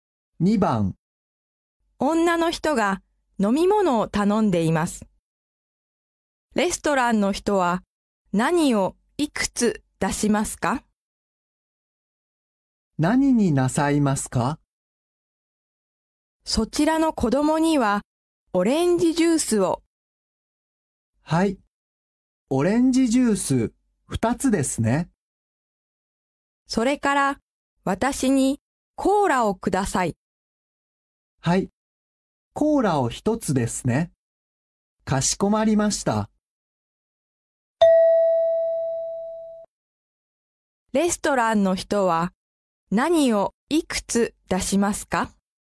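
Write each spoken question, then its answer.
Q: レストランの人は何をいくつ出しますか?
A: オレンジジュース2つとコーラ1つ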